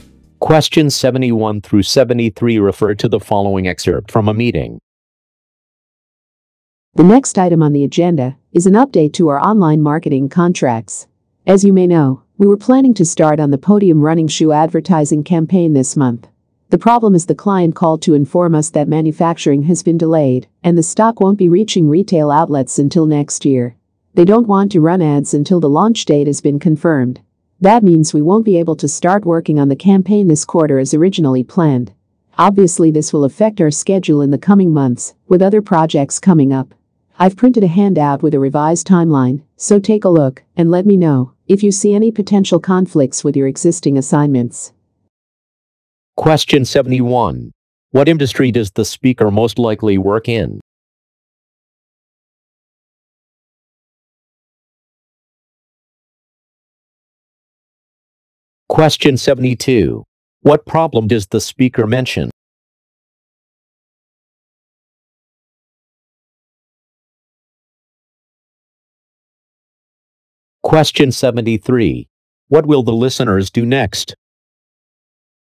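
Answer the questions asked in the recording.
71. Marketing / advertising
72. The client's manufacturing has been delayed
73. Review a revised timeline handout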